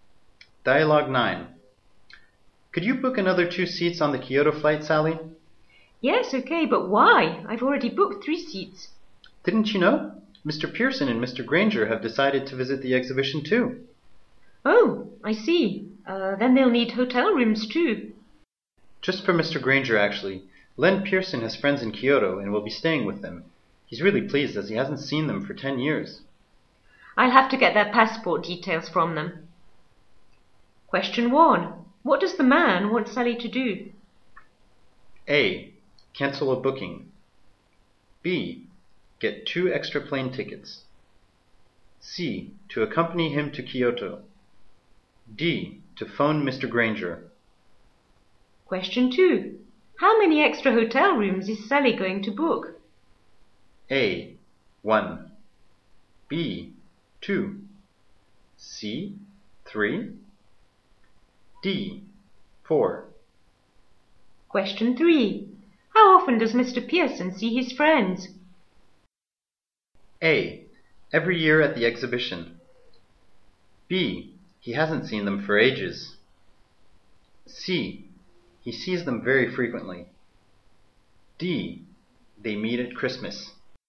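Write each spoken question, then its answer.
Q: What does the man want Sally to do?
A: B: Get 2 extra plane tickets.

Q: How many extra hotel rooms is Sally going to book?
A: A: 1.

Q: How often does Mr. Pearson see his friends?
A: B: He hasn't seen them for ages.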